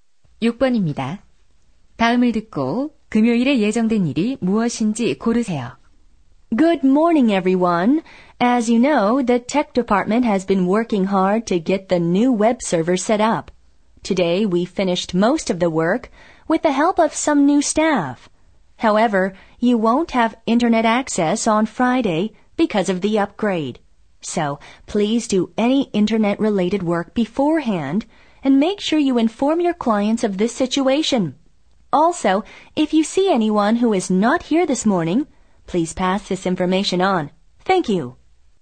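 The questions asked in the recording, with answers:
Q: 다음을 듣고 금요일에 예정된 일이 무엇인지 고르세요.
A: 웹 서버 업그레이드로 인터넷 사용 불가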